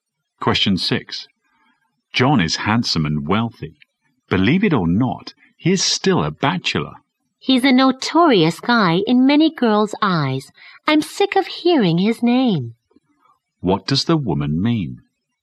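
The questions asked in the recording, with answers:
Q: What does the woman mean?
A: She dislikes John and is tired of hearing about him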